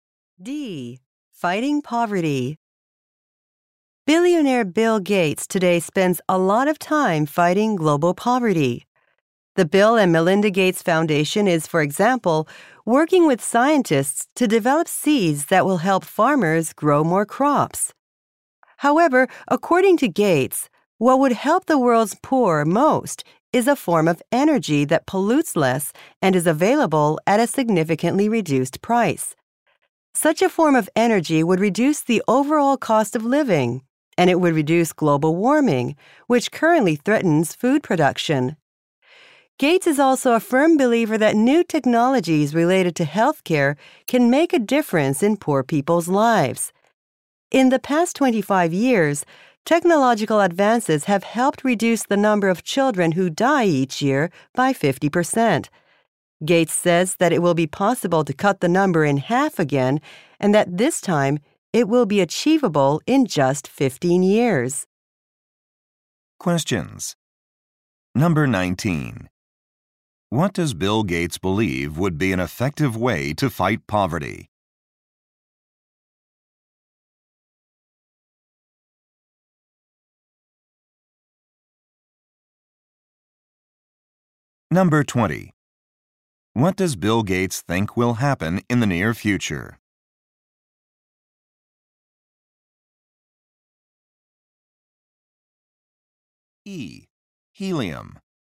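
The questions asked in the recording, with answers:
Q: What does Bill Gates believe would be an effective way to fight poverty?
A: A much cheaper form of energy that pollutes less.

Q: What does Bill Gates think will happen in the near future?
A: Child deaths will be cut in half again within 15 years.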